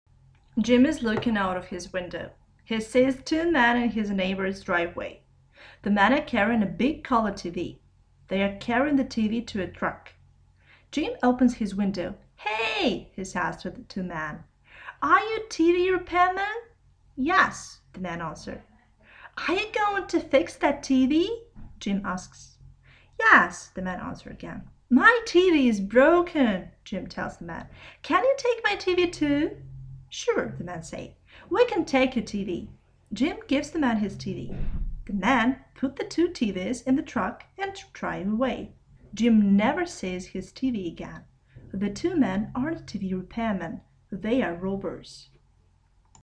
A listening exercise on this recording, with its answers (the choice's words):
Перед Вами на экране 5 незаконченных предложений A — E. Внимательно прочитайте их. Прочитайте также варианты ответов в выпадающем списке. Вы услышите разговор в магазине подарков. Для каждого предложения выберите из выпадающего списка концовку, соответствующую содержанию разговора. К каждому предложению подходит только одна концовка. Аудиотекст прозвучит 2 раза. При повторном прослушивании проверьте себя. У Вас есть 45 секунд, чтобы ознакомиться с предложениями.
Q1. Jim sees _________.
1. a man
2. two men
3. three men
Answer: two men

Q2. They are carrying the TV _________.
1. to a truck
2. to a bus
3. to a taxi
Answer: to a truck

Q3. Jim thinks that the men are _________.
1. builders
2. robbers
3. repairmen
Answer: repairmen

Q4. Jim`s TV is broken and he asks the men _________.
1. to fix it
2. to take it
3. to come to his place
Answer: to take it

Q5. After putting the TVs in the truck the men _________.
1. come to Jim`s house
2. go to the cafe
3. drive away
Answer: drive away

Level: 7 класс